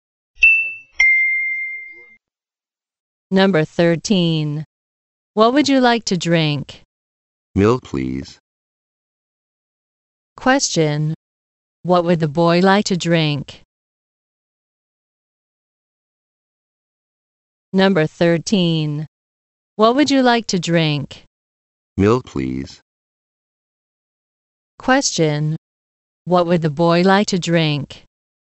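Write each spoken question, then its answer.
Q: Question. What would the boy like to drink?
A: Milk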